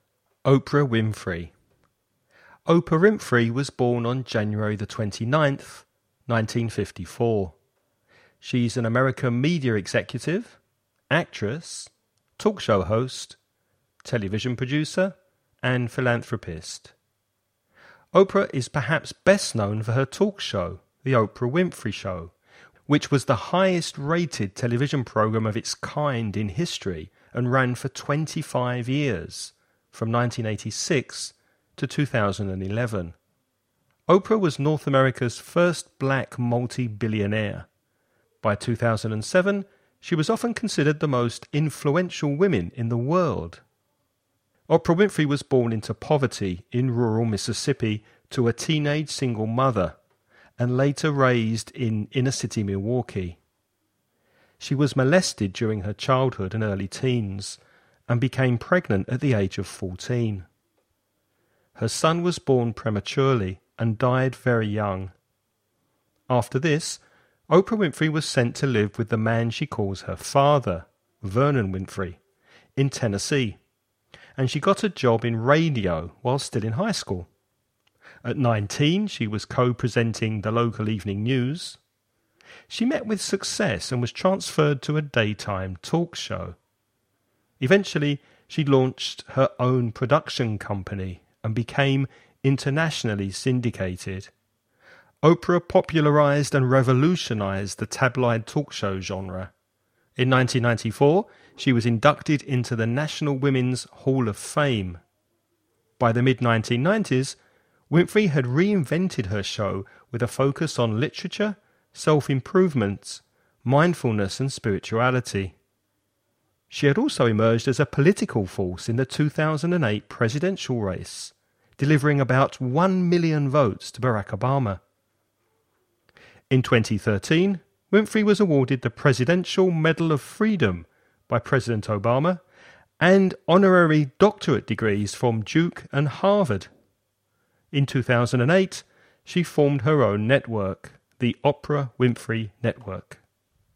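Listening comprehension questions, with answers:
Listen and write the questions you hear.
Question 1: For how many years was The Oprah Winfrey Show on TV?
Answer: 25 years

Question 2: In which US state was she born?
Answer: Mississippi

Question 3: What happened to her when she was 14?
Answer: She became pregnant

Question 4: How old was she when she was co-presenting the news?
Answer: 19

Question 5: Which politician did she support in 2008?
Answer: Barack Obama

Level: nivel intermedio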